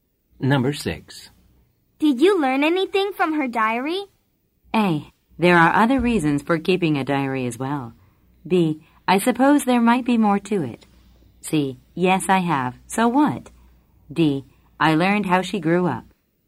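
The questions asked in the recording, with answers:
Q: Did you learn anything from her diary?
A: D: I learned how she grew up.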